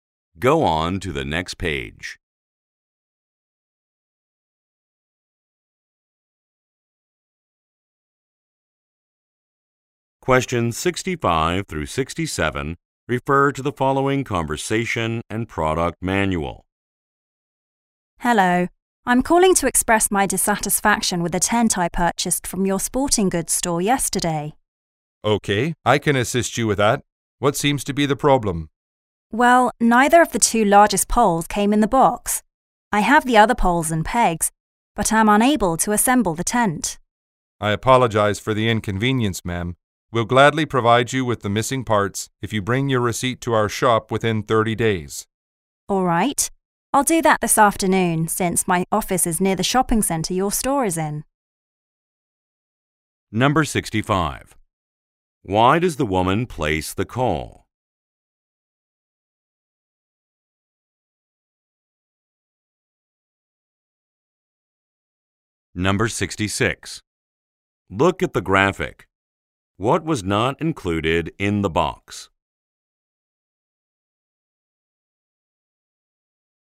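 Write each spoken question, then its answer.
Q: Why does the woman place the call?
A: To complain about a tent missing parts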